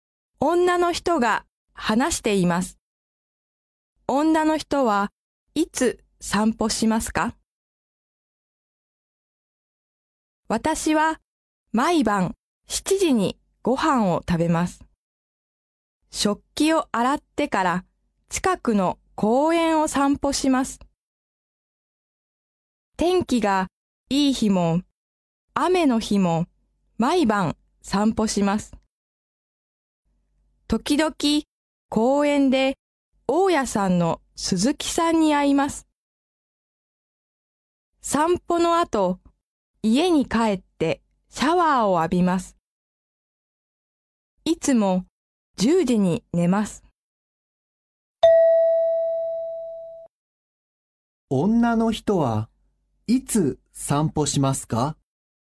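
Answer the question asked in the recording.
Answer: 毎晩、夕ご飯の後、食器を洗ってから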